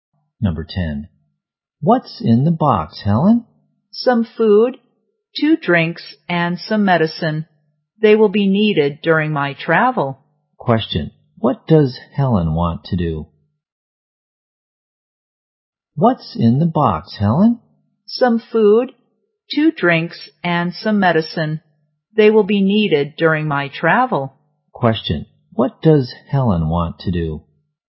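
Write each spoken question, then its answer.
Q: Question. What does Helen want to do?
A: Go traveling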